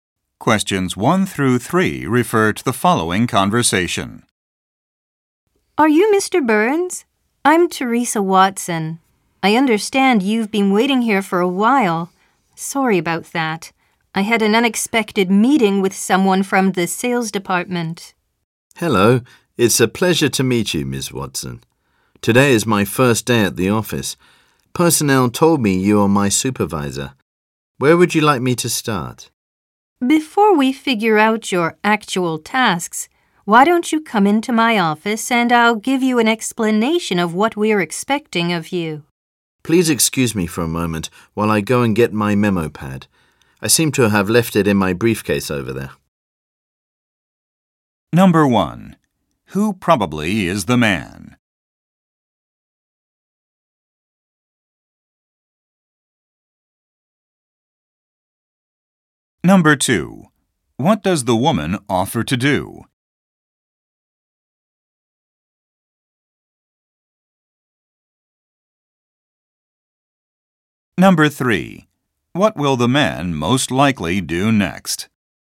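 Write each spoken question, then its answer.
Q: Who probably is the man?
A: A new employee on his first day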